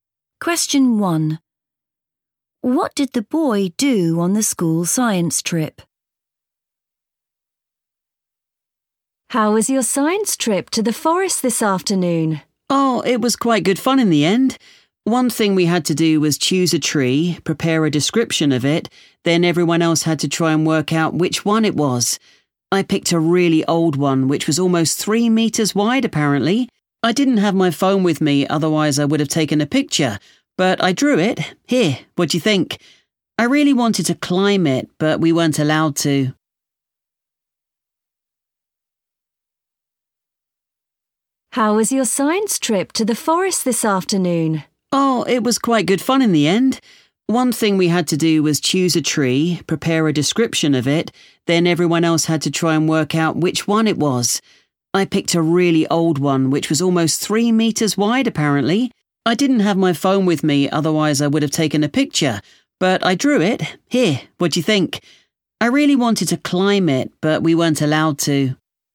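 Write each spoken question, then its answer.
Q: What did the boy do on the school science trip?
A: He drew a picture of a very old tree.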